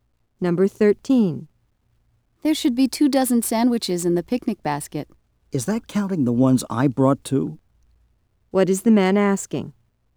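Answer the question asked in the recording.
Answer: Whether the two dozen includes the sandwiches he brought.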